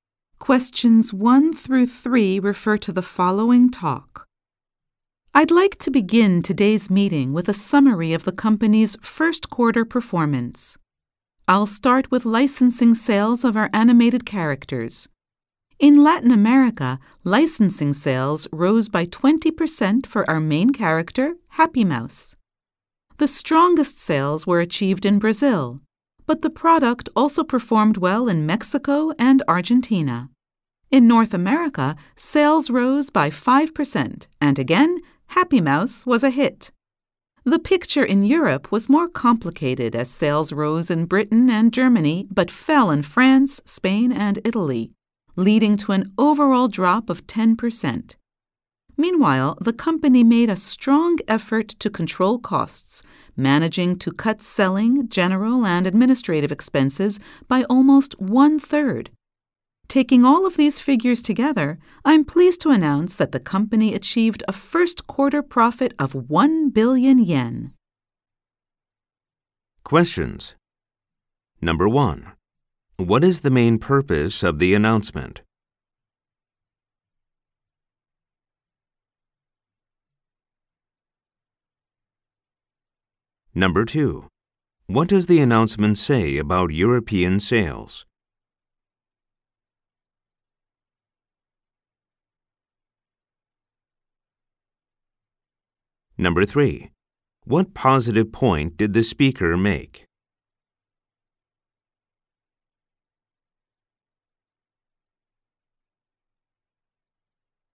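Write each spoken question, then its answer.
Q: What is the main purpose of the announcement?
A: To summarize the company's first quarter performance

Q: What does the announcement say about European sales?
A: They fell overall by 10%, rising in Britain and Germany but falling in France, Spain and Italy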